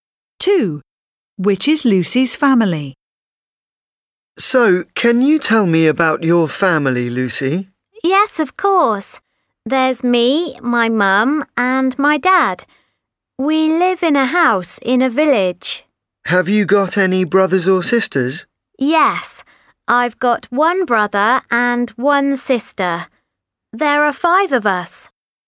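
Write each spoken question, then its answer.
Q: Which is Lucy's family?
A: Lucy, her mum, her dad, one brother and one sister (5 people)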